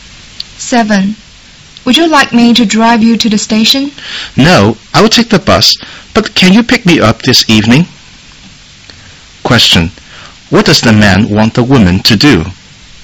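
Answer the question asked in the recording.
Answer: Pick him up this evening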